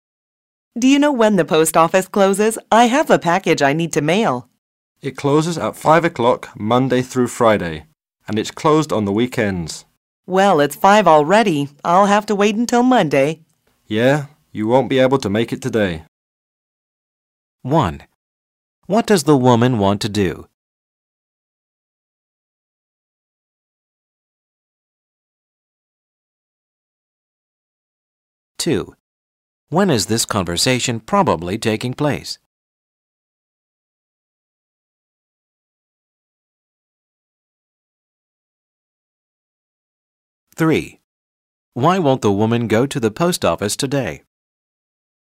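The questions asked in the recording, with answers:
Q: What does the woman want to do?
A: Mail a package

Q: When is this conversation probably taking place?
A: On a weekday at 5 o'clock

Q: Why won't the woman go to the post office today?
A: It is already closed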